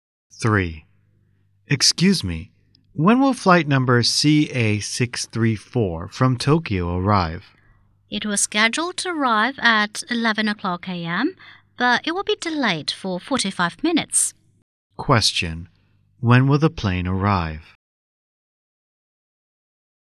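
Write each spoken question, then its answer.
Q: When will the plane arrive?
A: At 11:45 a.m.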